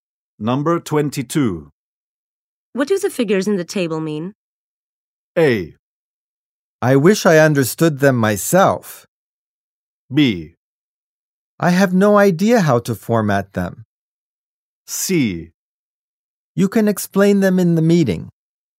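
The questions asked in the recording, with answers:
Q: What do the figures in the table mean?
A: A: I wish I understood them myself.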